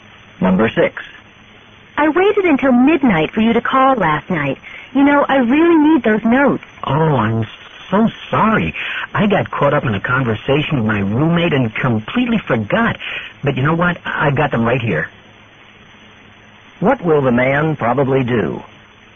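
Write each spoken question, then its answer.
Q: What will the man probably do?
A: Give the woman the notes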